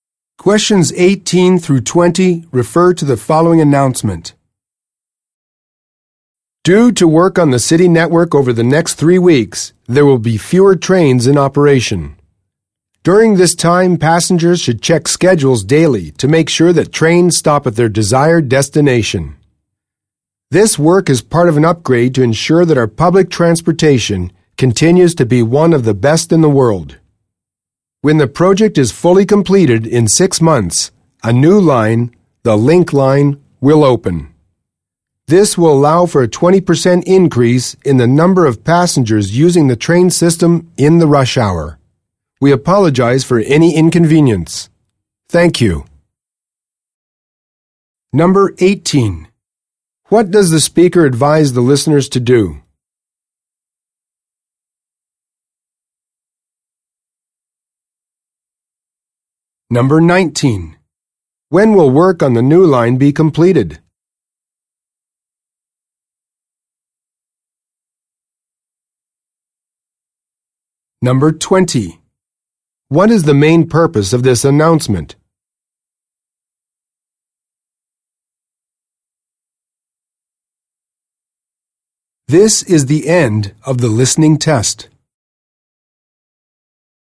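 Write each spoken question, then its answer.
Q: What does the speaker advise the listeners to do?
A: Check train schedules daily

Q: When will work on the new line be completed?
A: In 6 months

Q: What is the main purpose of this announcement?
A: To inform passengers of reduced train service due to network work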